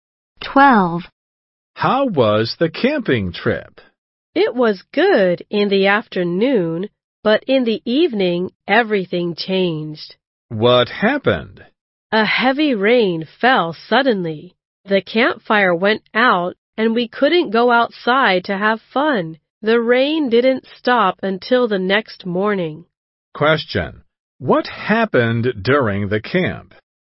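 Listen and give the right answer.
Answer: A heavy rain fell suddenly, and the campfire went out.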